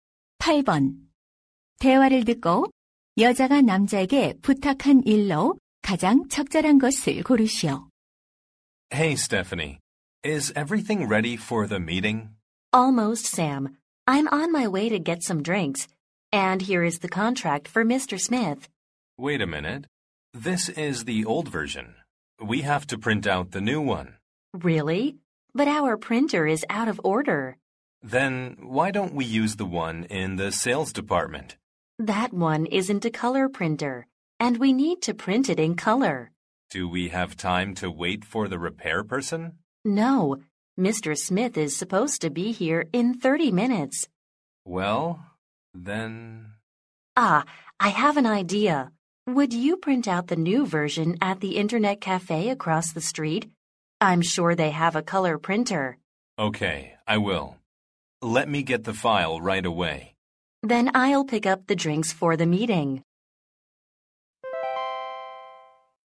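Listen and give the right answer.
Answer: 길 건너 인터넷 카페에서 새 계약서 출력하기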